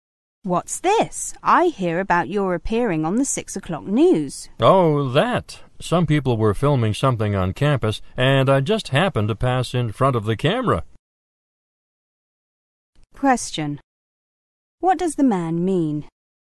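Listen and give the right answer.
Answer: He appeared on the news only by chance, passing in front of the camera.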